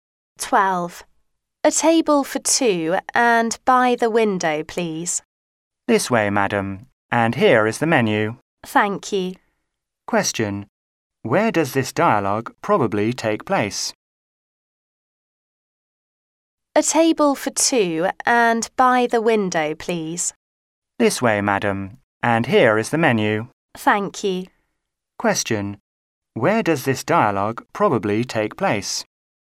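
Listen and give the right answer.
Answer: In a restaurant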